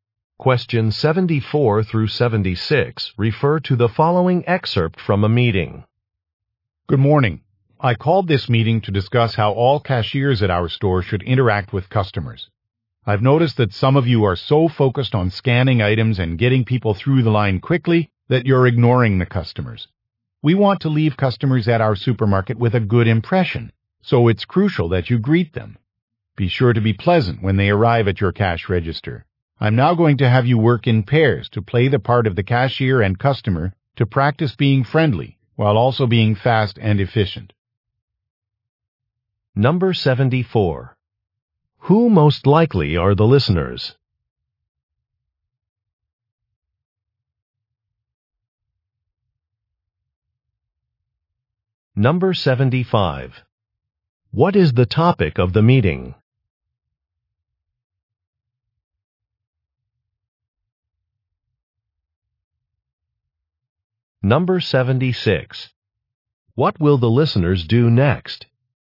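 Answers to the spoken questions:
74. Supermarket cashiers
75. How cashiers should interact with customers
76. Practice in pairs by role-playing cashier and customer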